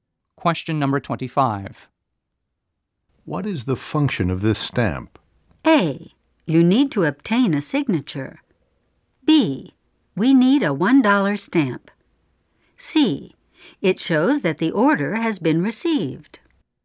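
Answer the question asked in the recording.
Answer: C: It shows that the order has been received.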